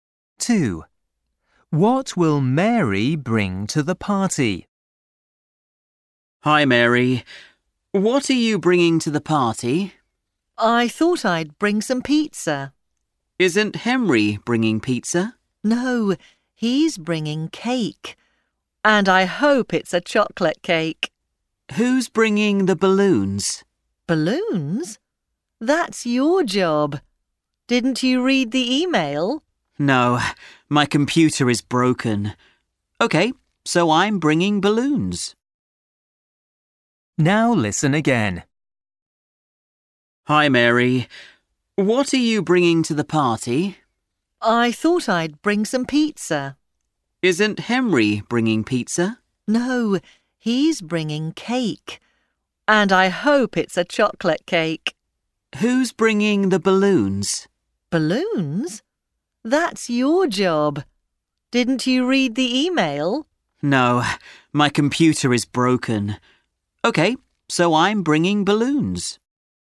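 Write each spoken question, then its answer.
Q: What will Mary bring to the party?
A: balloons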